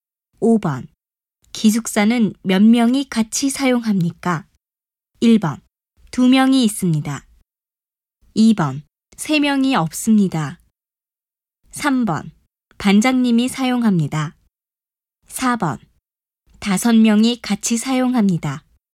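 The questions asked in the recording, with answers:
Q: 기숙사는 몇 명이 같이 사용합니까?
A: 4: 5명이 같이 사용합니다.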